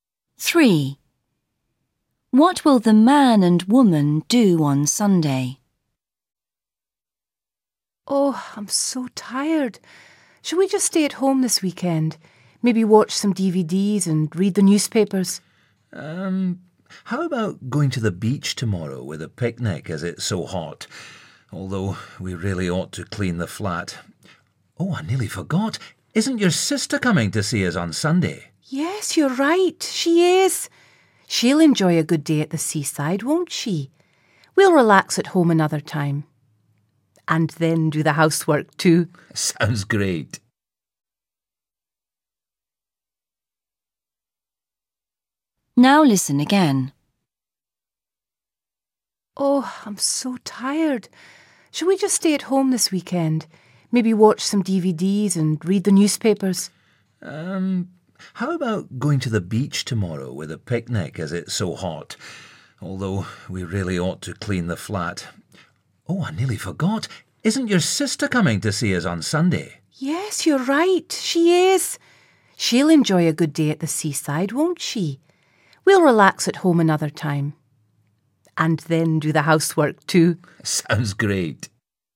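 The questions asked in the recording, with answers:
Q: What will the man and woman do on Sunday?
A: Go to the beach/seaside with his sister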